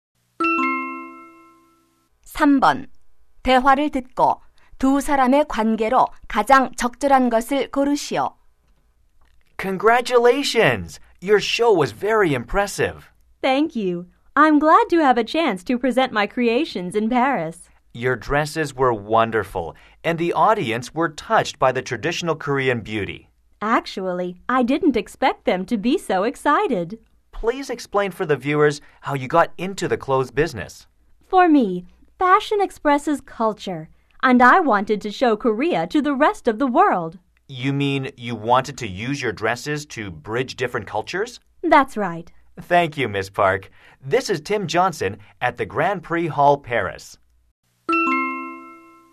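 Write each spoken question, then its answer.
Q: 대화를 듣고 두 사람의 관계로 가장 적절한 것을 고르시오.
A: 리포터와 패션 디자이너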